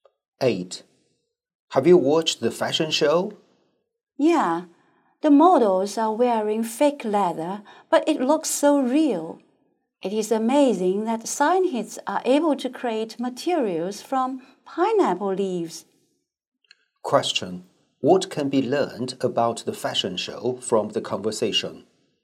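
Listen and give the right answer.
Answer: The models wore fake leather made from pineapple leaves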